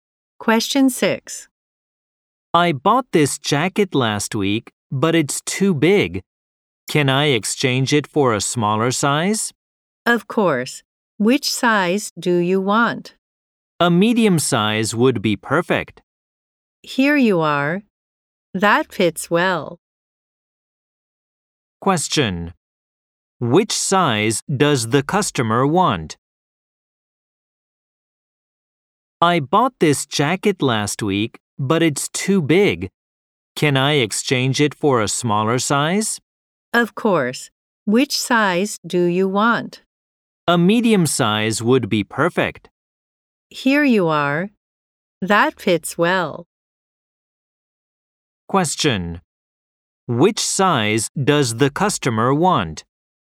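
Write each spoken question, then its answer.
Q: Which size does the customer want?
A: Medium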